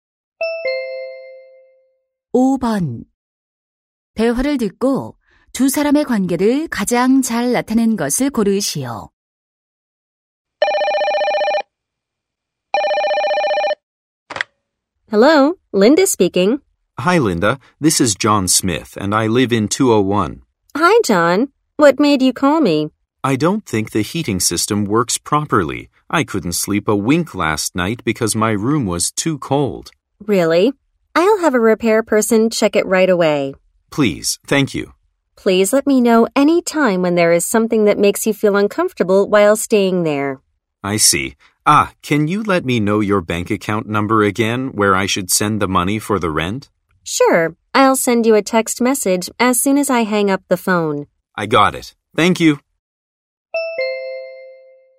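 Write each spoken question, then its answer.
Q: 대화를 듣고 두 사람의 관계를 가장 잘 나타낸 것을 고르시오.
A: 집주인과 세입자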